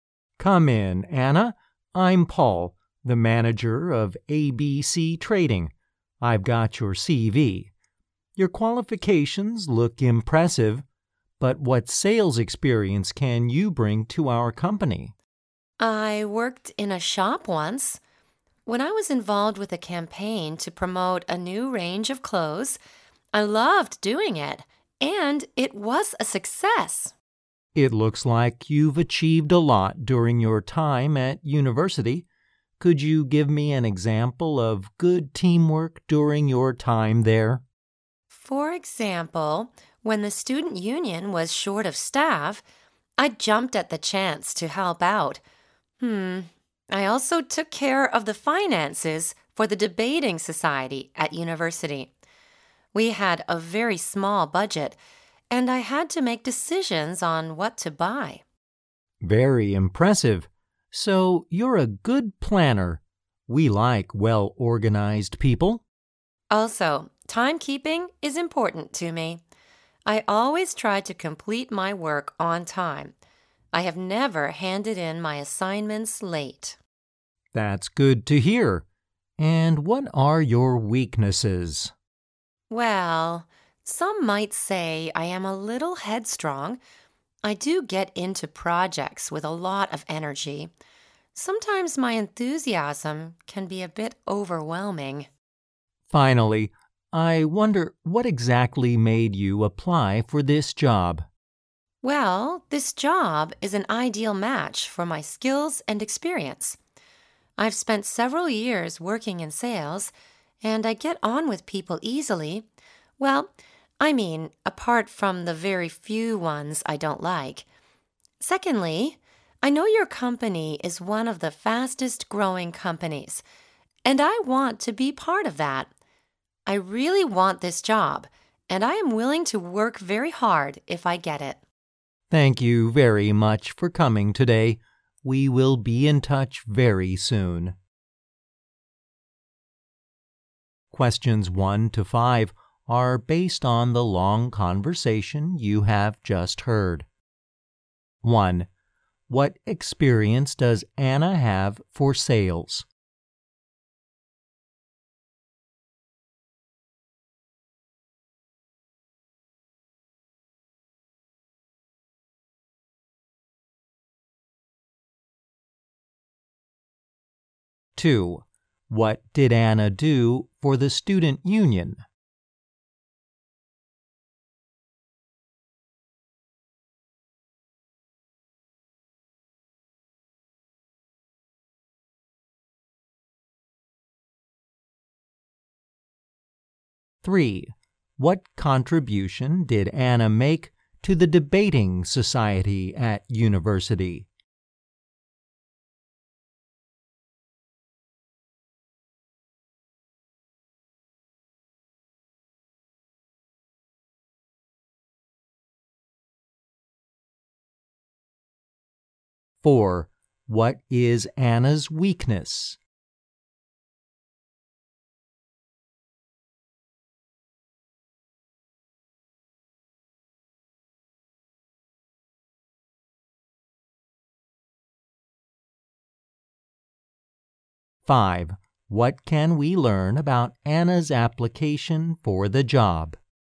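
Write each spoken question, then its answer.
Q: What experience does Anna have for sales?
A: She worked in a shop and helped with a successful campaign to promote a new range of clothes.

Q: What did Anna do for the student union?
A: She helped out when it was short of staff.

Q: What contribution did Anna make to the debating society at university?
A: She took care of its finances and decided what to buy on a small budget.

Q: What is Anna's weakness?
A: She is a little headstrong, and her enthusiasm can be overwhelming.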